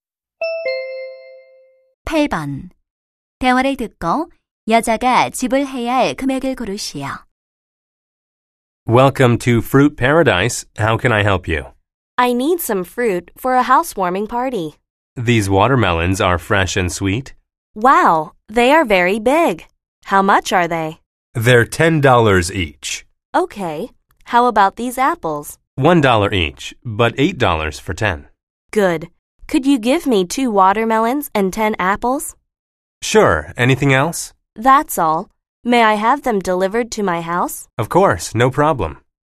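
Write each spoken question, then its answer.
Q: 대화를 듣고 여자가 지불 해야 할 금액을 고르시오.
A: 28달러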